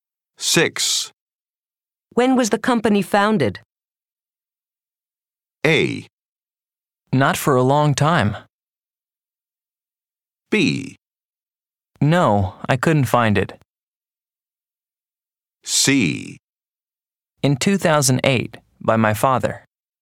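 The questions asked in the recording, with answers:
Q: When was the company founded?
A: C: In 2008, by my father.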